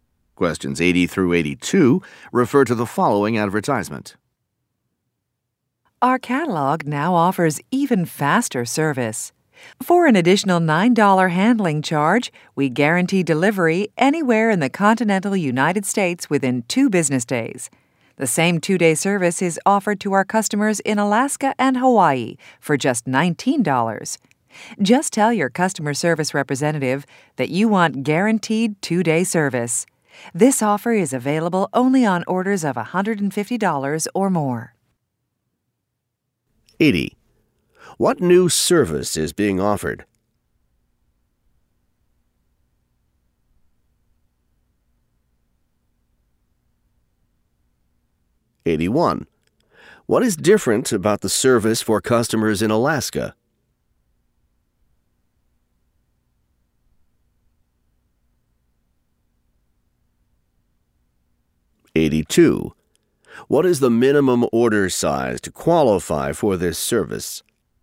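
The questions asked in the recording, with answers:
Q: What new service is being offered?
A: Guaranteed 2-day delivery

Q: What is different about the service for customers in Alaska?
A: It costs $19 instead of $9

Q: What is the minimum order size to qualify for this service?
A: $150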